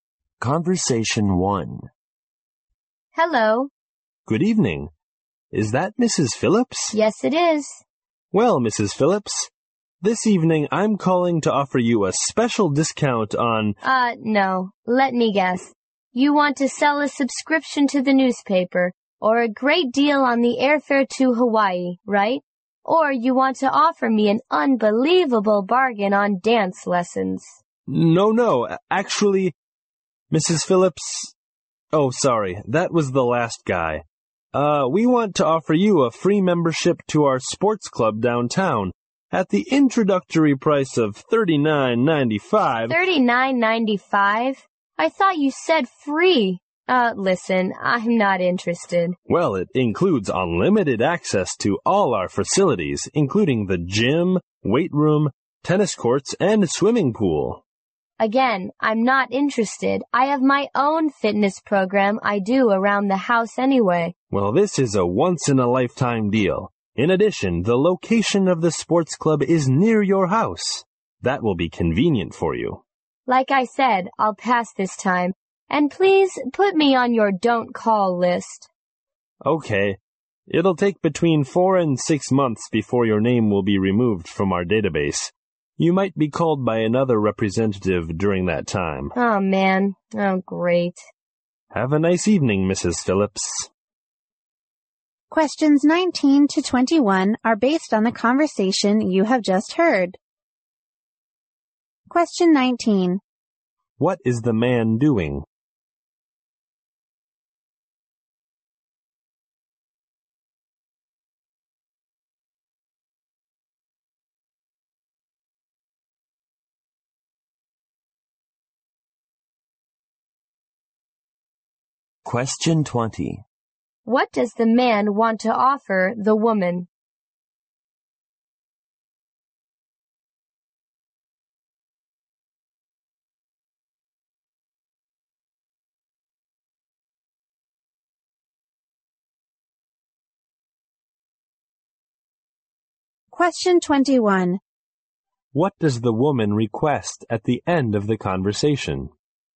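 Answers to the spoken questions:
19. Making a sales call
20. A sports club membership at $39.95
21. To be put on the don't call list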